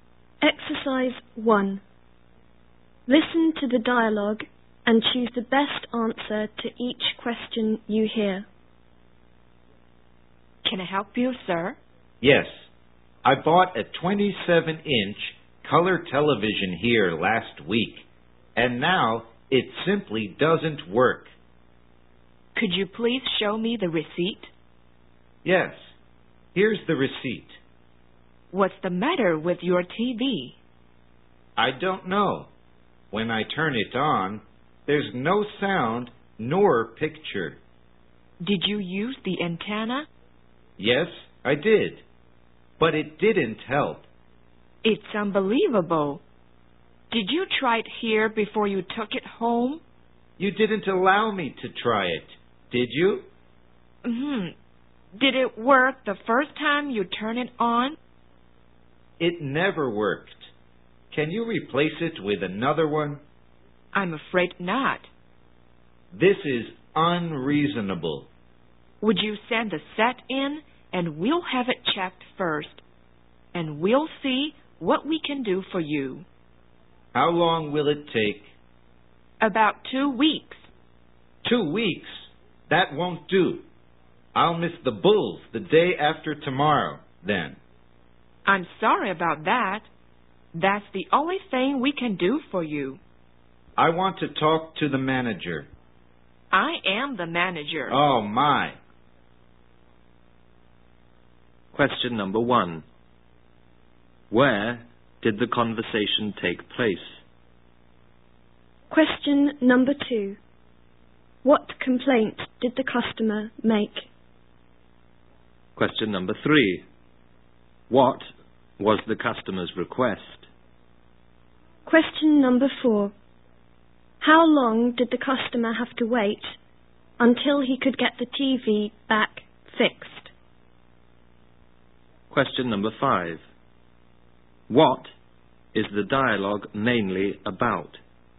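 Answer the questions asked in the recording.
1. In a store that sells TVs
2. The new TV he bought last week doesn't work: no sound or picture
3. To replace the TV with another one
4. About 2 weeks
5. A customer complaining about a TV that doesn't work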